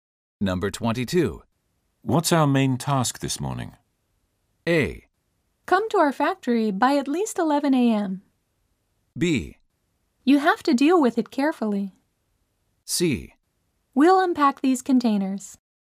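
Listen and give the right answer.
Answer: C: We'll unpack these containers.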